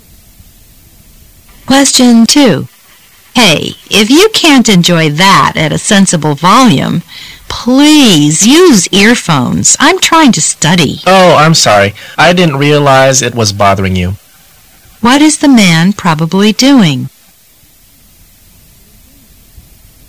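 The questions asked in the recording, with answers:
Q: What is the man probably doing?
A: Playing music loudly.

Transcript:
[解析] W: Hey! If you can't enjoy that at a sensible volume, please use earphones. I'm trying to study. M: Oh! I'm sorry, I didn't realize it was bothering you. Q: What is the man probably doing?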